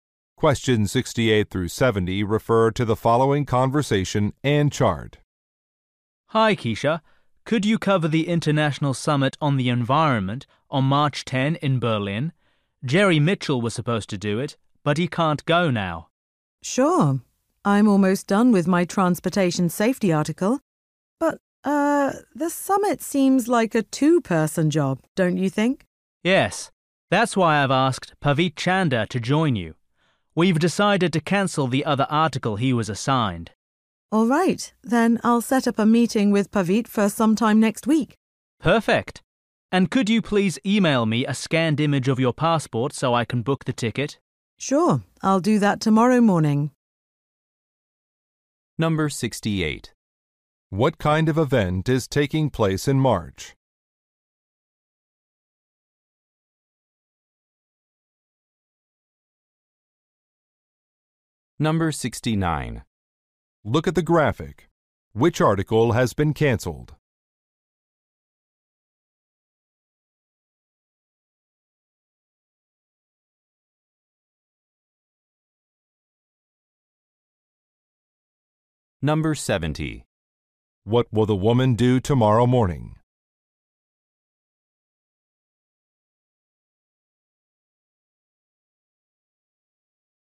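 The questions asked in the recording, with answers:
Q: What kind of event is taking place in March?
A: An environmental summit

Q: What will the woman do tomorrow morning?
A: Email a scan of her passport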